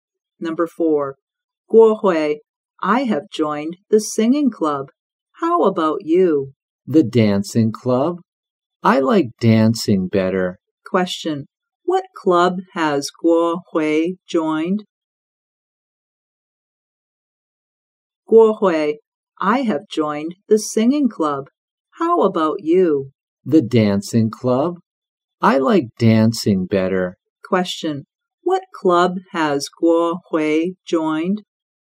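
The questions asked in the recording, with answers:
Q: what club has Guo Hui joined?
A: The dancing club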